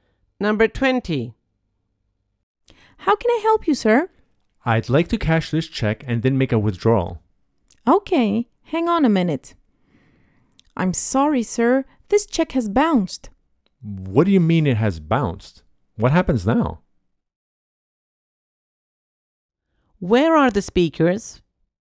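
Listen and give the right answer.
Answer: At a bank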